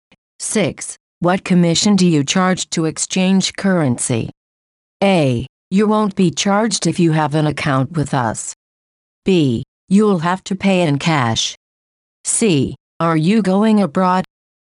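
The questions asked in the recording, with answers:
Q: What commission do you charge to exchange currency?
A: A: You won't be charged if you have an account with us.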